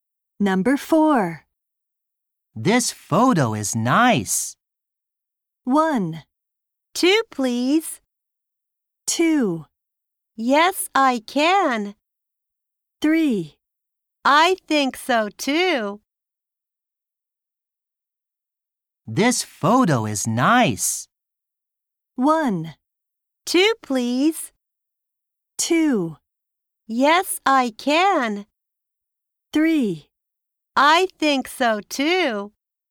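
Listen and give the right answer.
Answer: 3: I think so, too.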